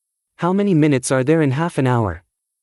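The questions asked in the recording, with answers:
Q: How many minutes are there in half an hour?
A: 30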